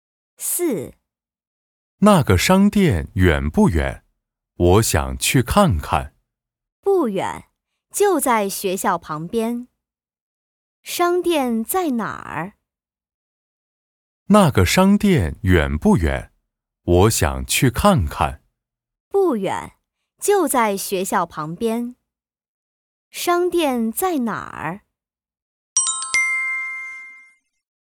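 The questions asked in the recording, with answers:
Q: 商店在哪儿?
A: 在学校旁边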